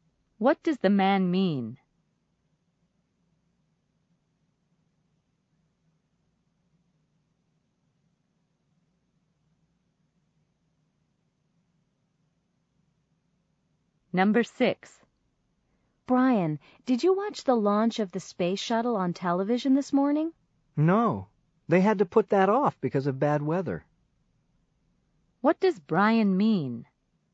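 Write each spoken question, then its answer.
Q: What does Brian mean?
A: The launch was postponed because of bad weather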